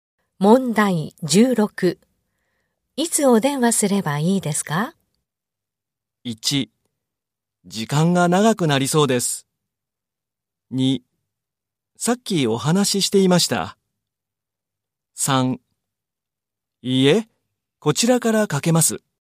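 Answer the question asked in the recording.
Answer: 3: いいえ、こちらからかけます。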